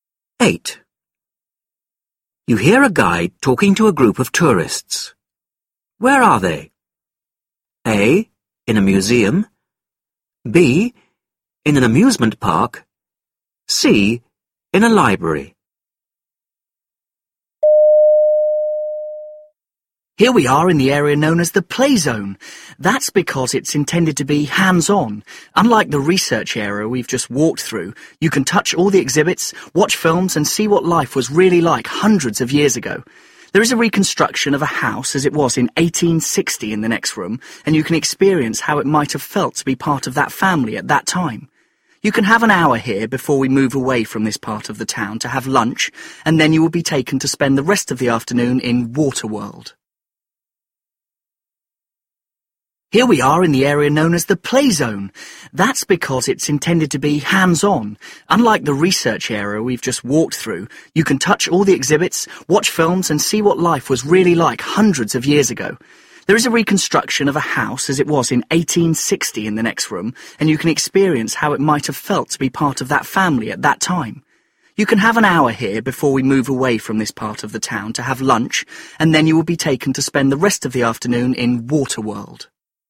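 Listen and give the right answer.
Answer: A: In a museum.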